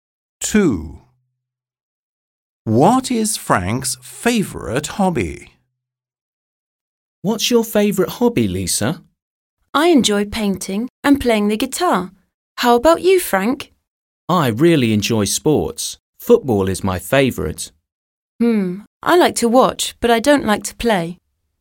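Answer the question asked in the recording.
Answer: Football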